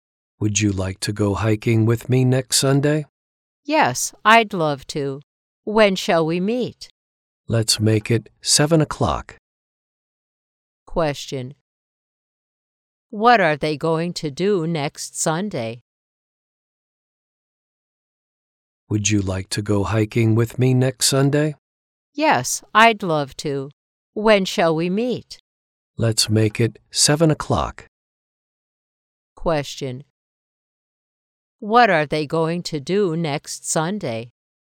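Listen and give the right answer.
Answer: Go hiking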